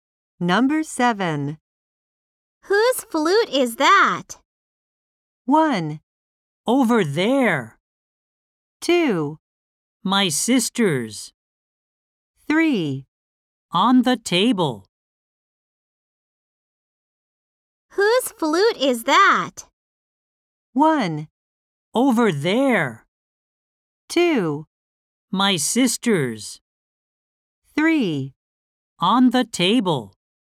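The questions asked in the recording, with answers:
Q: Whose flute is that?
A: 2: My sister's.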